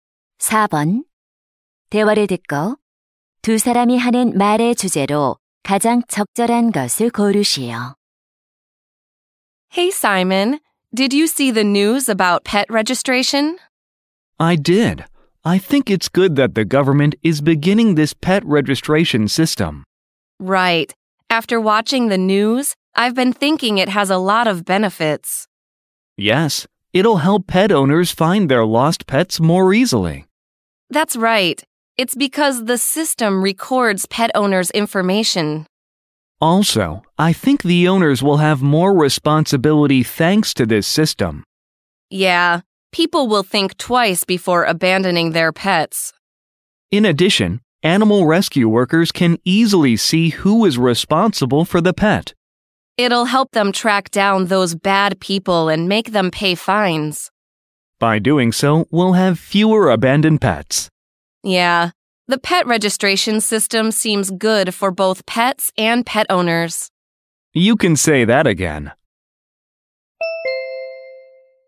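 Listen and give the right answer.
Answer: 반려동물 등록제의 이점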